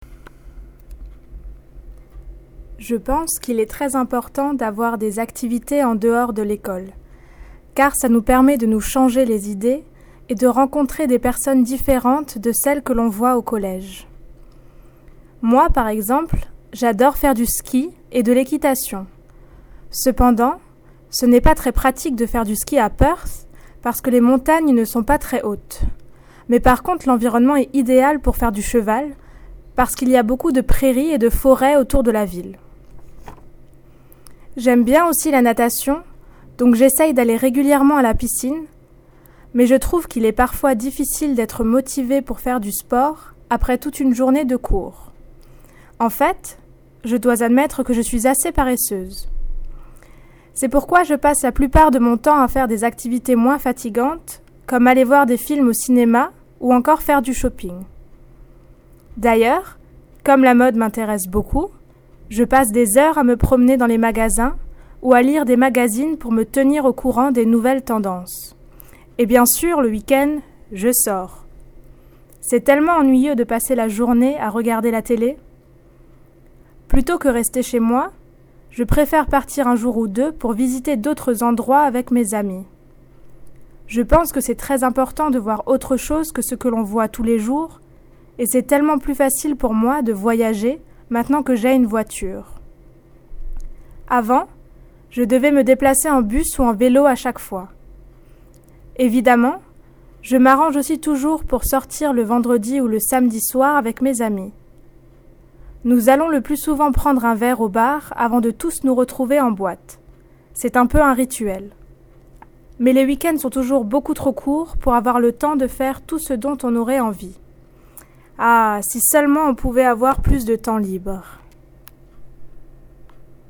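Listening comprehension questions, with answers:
Sarah talks about her hobbies and what she likes to do in her free time.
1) Why does Sarah think it is important to take part in activities out with school? (2)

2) What does she like to do? (1)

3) Why does she prefer to go to Perth? (3)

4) What activities does she particularly enjoy and why? (3)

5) What does she tend to do at the weekend? (3)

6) How does she normally travel about? (1)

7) What does she describe as a 'ritual'? (2)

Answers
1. To take your mind off things and meet people different from those at school
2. Skiing and horse riding
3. The surroundings are ideal for horse riding, with lots of meadows and forests around the town
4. Cinema and shopping, because they are less tiring (she is lazy) and she is interested in fashion
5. She goes away for a day or two with friends to visit other places
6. By car
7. Having a drink at a bar before meeting up at a nightclub on Friday or Saturday night

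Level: New Higher French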